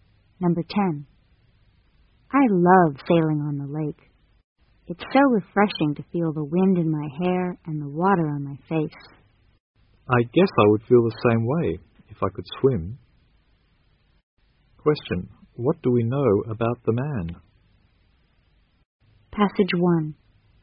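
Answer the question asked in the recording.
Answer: He can't swim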